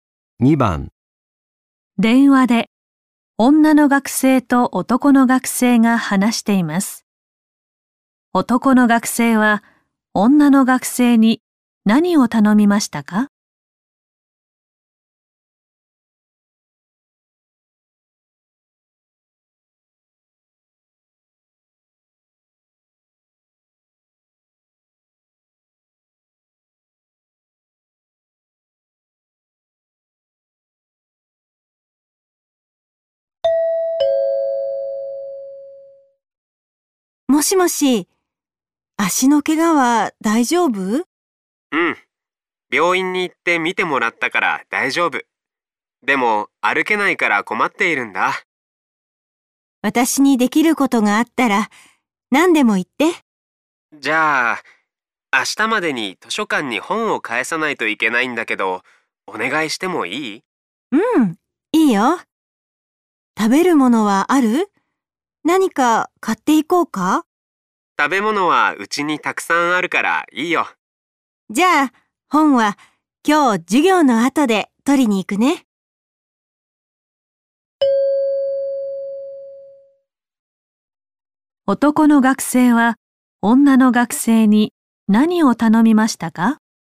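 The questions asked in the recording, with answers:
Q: 男の学生は女の学生に何を頼みましたか?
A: 図書館に本を返すこと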